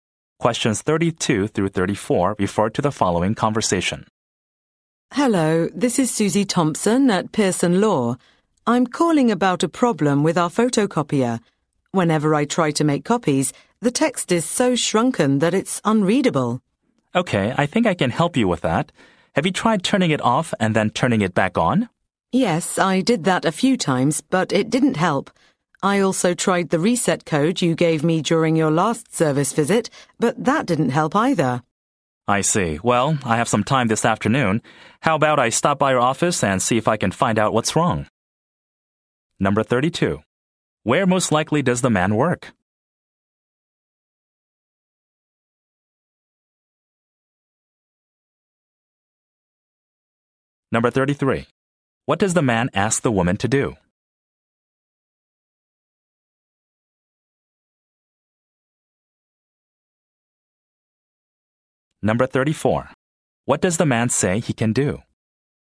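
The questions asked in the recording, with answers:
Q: Where most likely does the man work?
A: At a photocopier repair/service company

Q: What does the man ask the woman to do?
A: Turn the machine off and back on

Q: What does the man say he can do?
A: Stop by her office this afternoon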